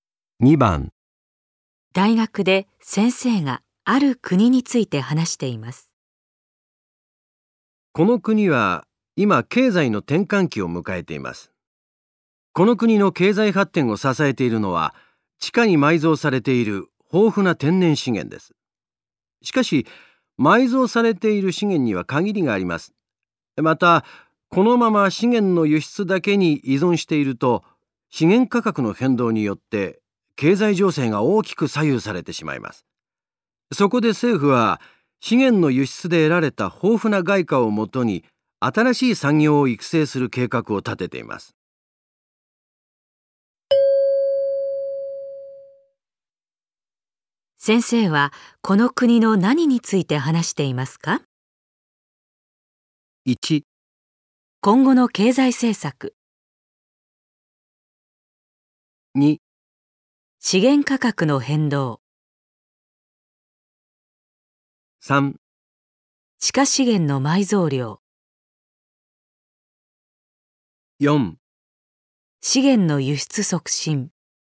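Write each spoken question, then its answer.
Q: 先生はこの国の何について話していますか?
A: 1: 今後の経済政策。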